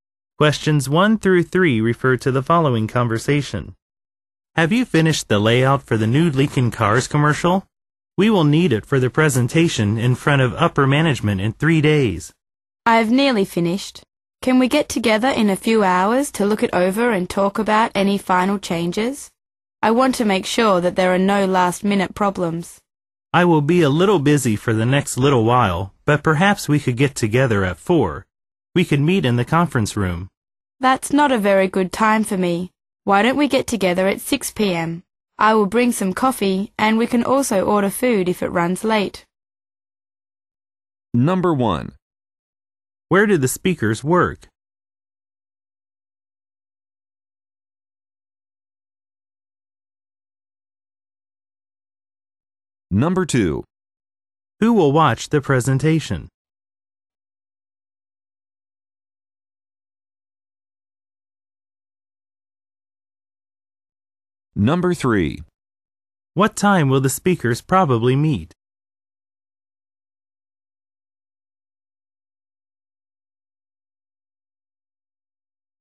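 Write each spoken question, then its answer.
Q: Who will watch the presentation?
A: Upper management

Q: What time will the speakers probably meet?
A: At 6 p.m.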